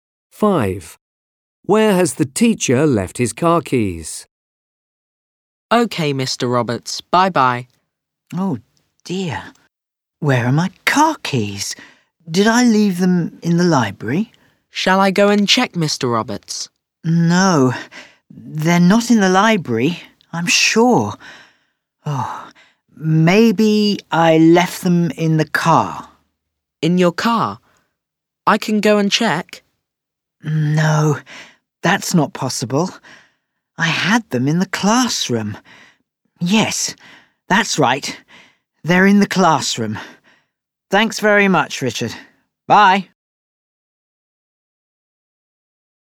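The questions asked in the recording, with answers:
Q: Where has the teacher left his car keys?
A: In the classroom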